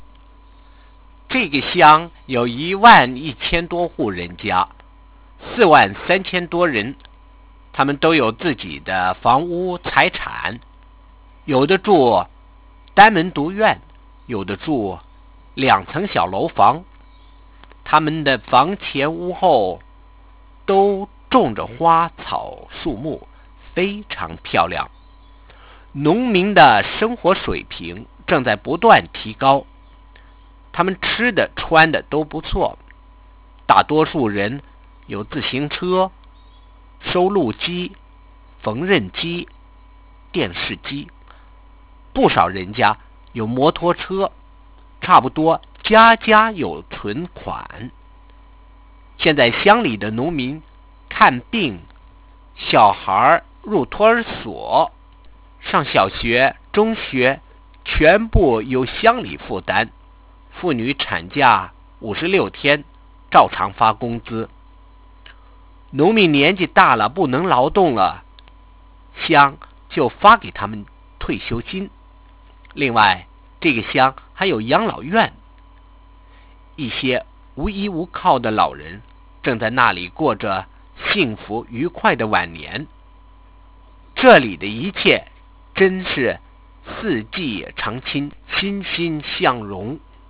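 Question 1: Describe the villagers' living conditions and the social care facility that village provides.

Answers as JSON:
{"1": "They own their houses (courtyards or two-storey houses) with flowers and trees, eat and dress well, most have bicycles, recorders, sewing machines and TVs, many have motorbikes, and almost every family has savings. The village pays for medical care, nursery and school; women get 56 days of paid maternity leave; old people get pensions; and there is a home for elderly people who have no one to support them."}

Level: Second year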